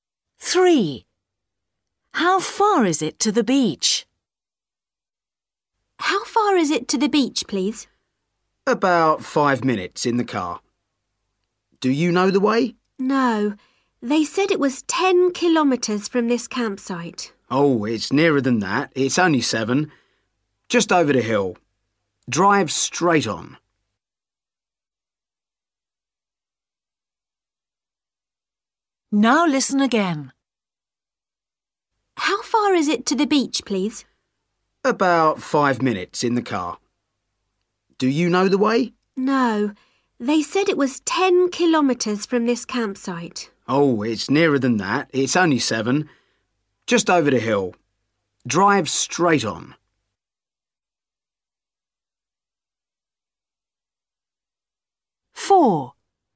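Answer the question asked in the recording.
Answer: 7 kilometres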